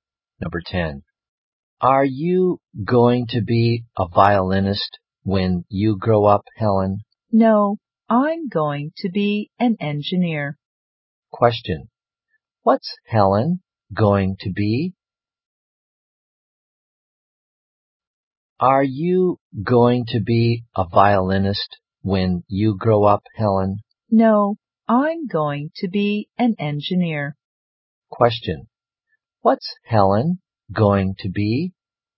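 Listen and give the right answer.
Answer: An engineer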